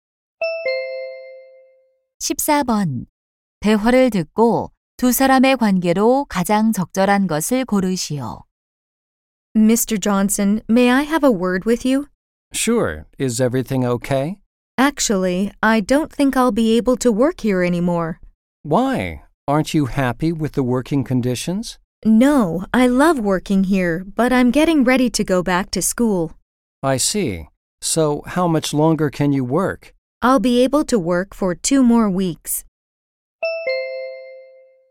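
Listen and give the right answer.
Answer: 고용주와 직원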